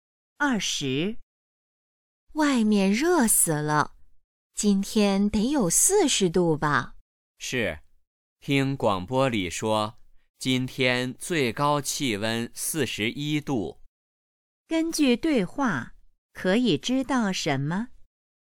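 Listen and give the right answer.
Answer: 今天很热,最高气温41度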